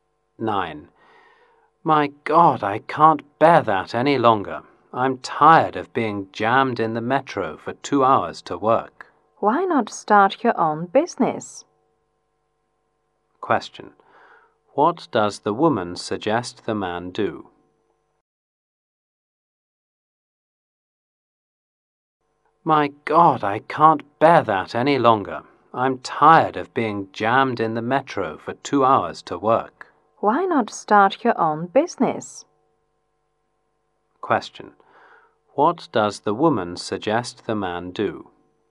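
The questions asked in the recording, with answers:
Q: What does the woman suggest the man do?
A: Start his own business.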